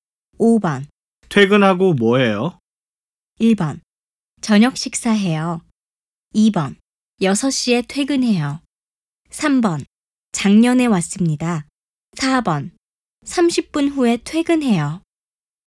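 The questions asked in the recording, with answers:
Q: 퇴근하고 뭐해요?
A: 1: 저녁 식사해요.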